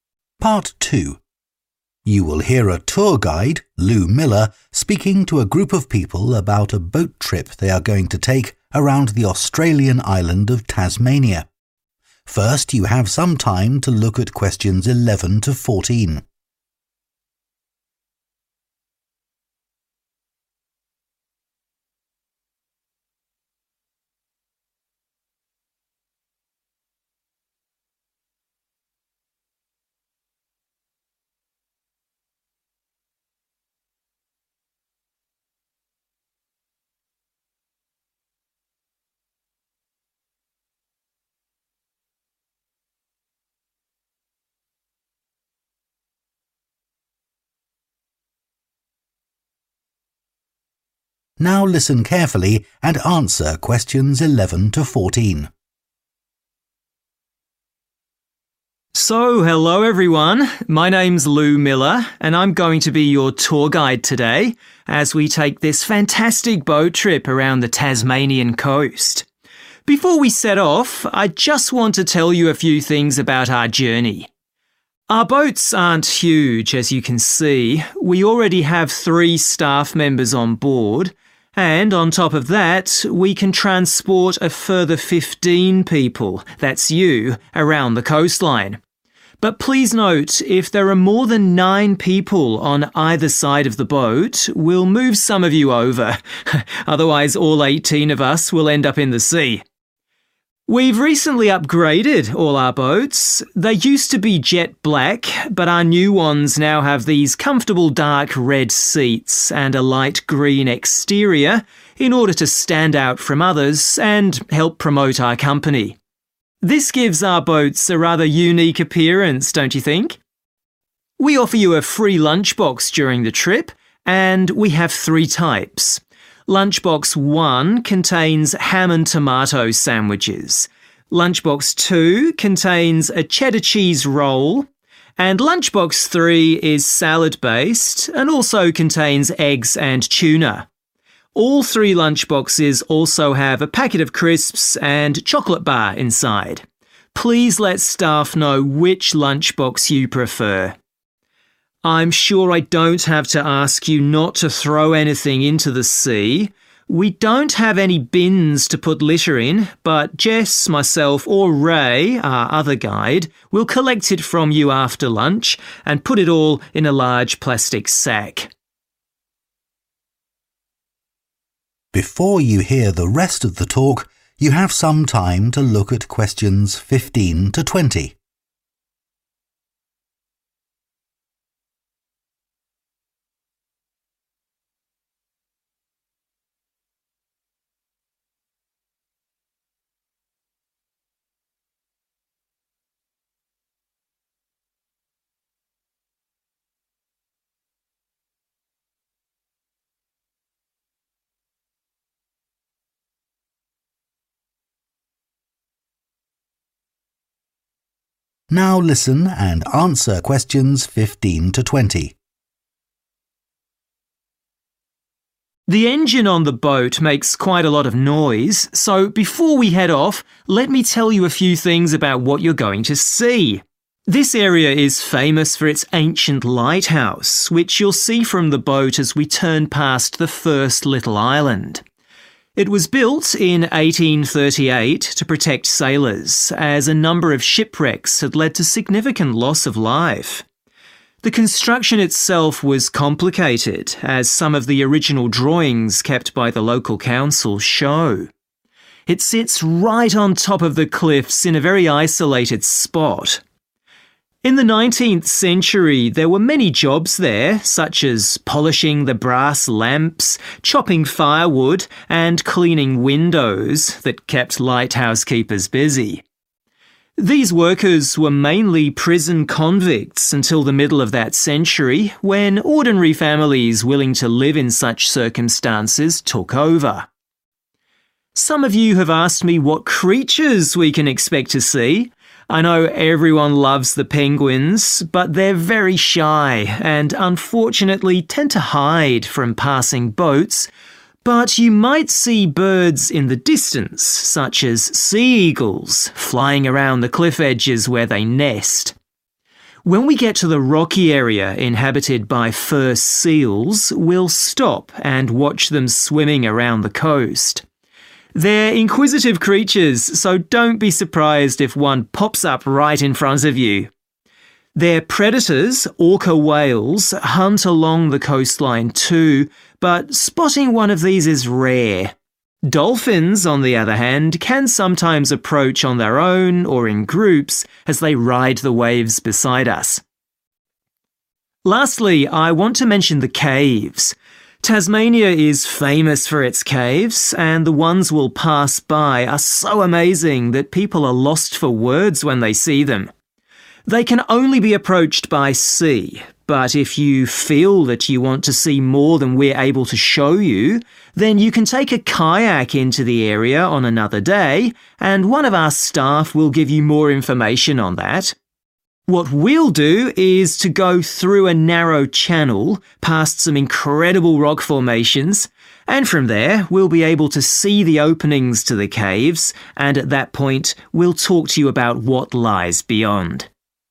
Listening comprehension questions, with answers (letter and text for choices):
Choose the correct letter, A, B or C.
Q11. What is the maximum number of people who can stand on each side of the boat?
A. 9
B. 15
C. 18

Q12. What colour are the tour boats?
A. dark red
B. jet black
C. light green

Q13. Which lunchbox is suitable for someone who doesn't eat meat or fish?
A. Lunchbox 1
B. Lunch box 2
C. Lunch box 3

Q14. What should people do with their litter?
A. take it home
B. hand it to a member of staff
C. put it in the bins provided on the boat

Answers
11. A. 9
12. C. light green
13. B. Lunch box 2
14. B. hand it to a member of staff